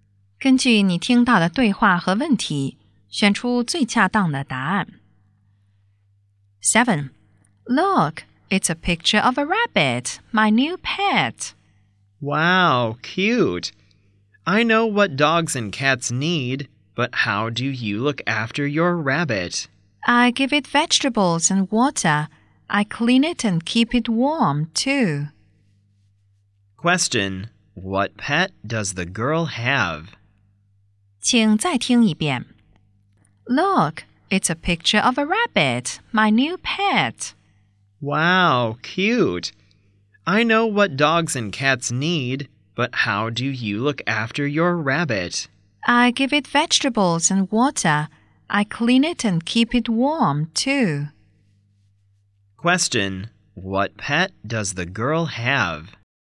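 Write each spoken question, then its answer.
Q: Question, what pet does the girl have?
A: A rabbit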